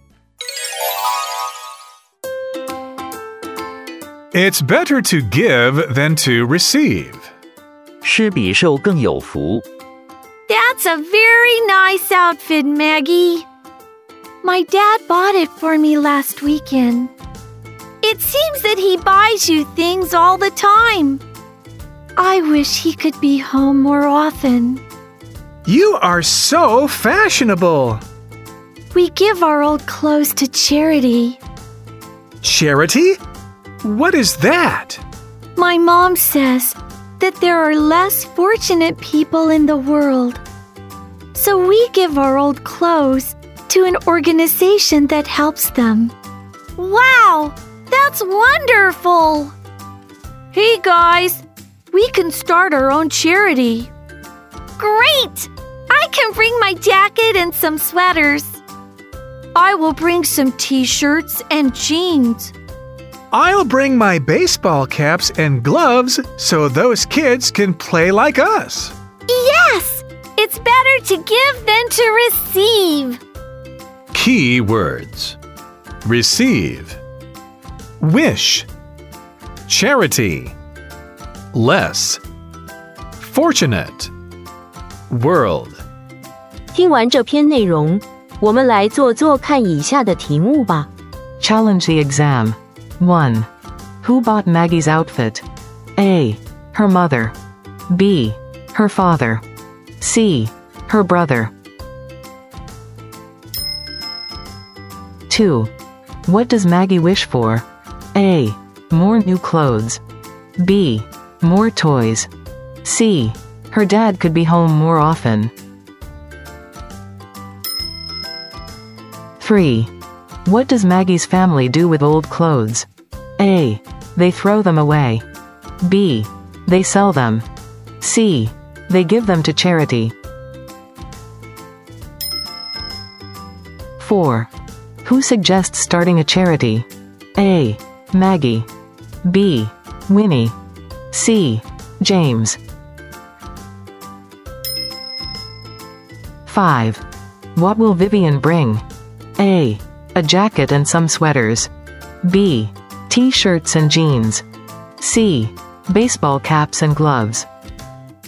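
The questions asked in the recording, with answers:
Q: Who bought Maggie's outfit?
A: B: Her father.

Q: What does Maggie wish for?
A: C: Her dad could be home more often.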